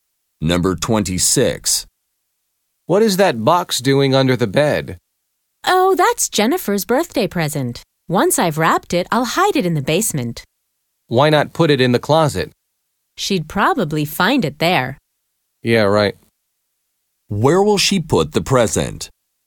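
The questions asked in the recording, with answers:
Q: Where will she put the present?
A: In the basement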